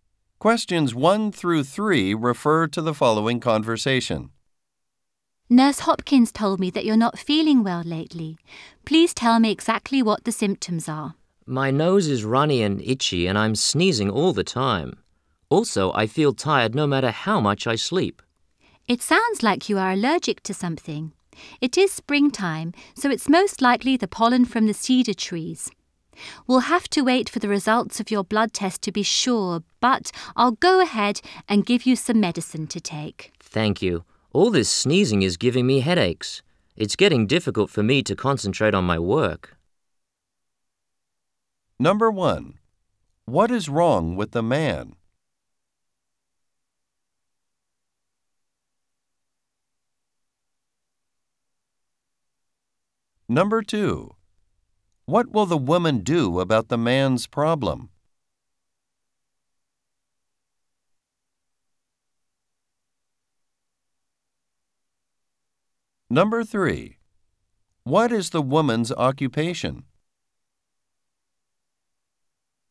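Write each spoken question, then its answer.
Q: What is wrong with the man?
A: He has allergies, probably to cedar pollen (runny nose, sneezing, tiredness)

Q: What will the woman do about the man's problem?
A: Give him some medicine (and wait for his blood test results)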